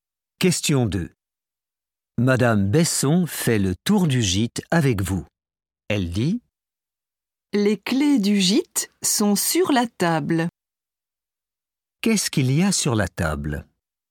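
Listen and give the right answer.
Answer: les clés du gîte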